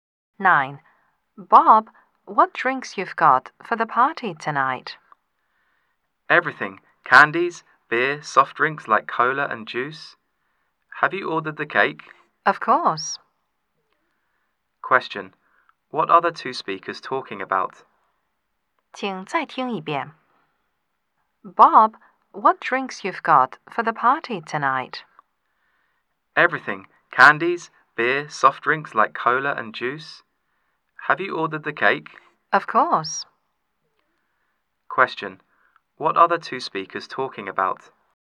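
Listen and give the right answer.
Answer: Preparations for the party tonight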